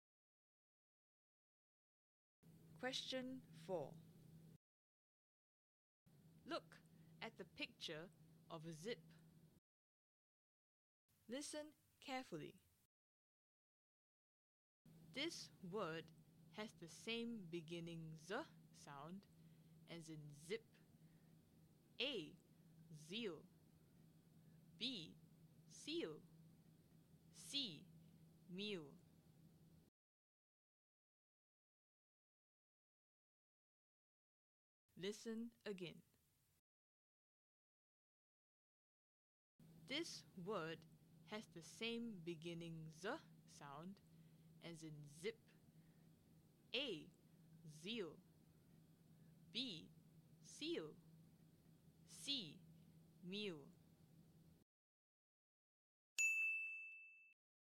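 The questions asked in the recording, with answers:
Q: This word has the same beginning z sound as in zip.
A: A: Zeal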